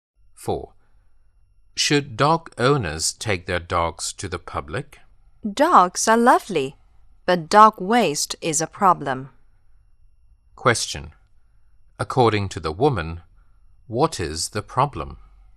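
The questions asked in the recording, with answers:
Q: According to the woman, what is the problem?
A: Dog waste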